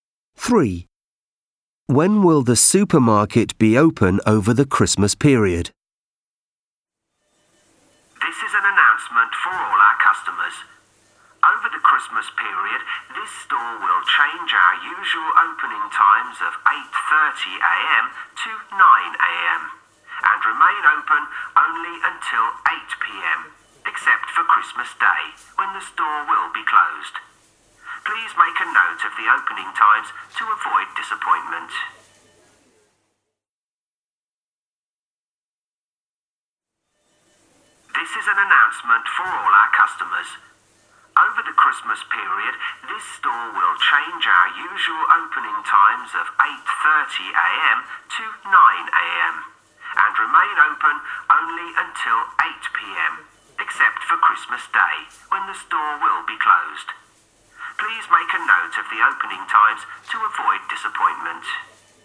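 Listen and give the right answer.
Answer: 9 a.m. to 8 p.m., closed on Christmas Day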